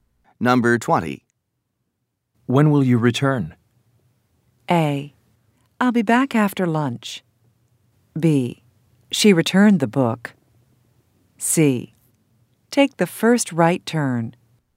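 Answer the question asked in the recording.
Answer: A: I'll be back after lunch.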